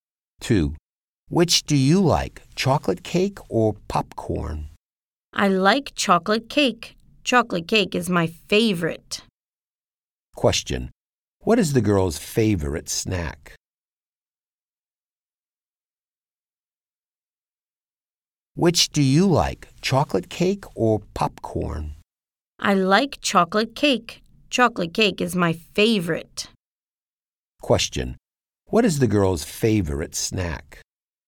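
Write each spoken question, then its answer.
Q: Question. What is the girl's favorite snack?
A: Chocolate cake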